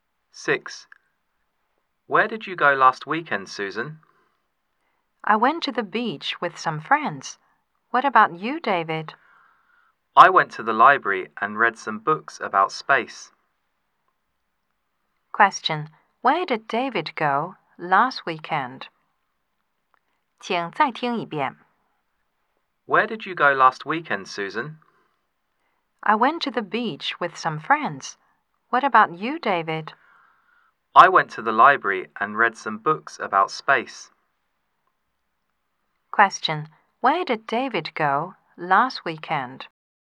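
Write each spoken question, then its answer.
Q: Where did David go last weekend?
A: To the library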